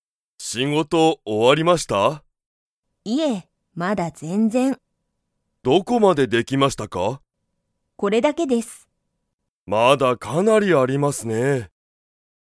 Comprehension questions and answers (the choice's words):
木戸(きど)さんは、仕事(しごと)が終(お)わりましたか?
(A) はい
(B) いいえ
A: いいえ

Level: Level 1